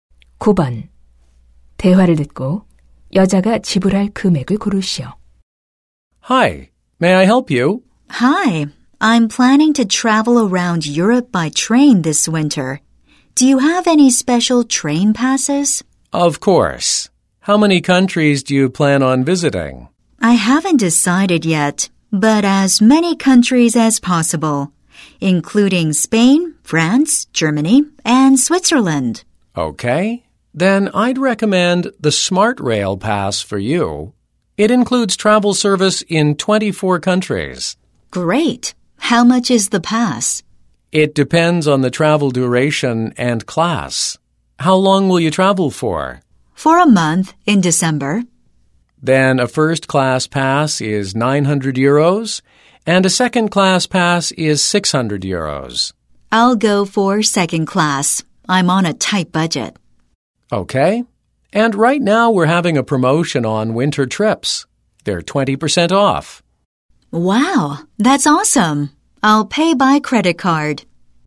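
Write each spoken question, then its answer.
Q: 대화를 듣고 여자가 지불할 금액을 고르시오.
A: 480유로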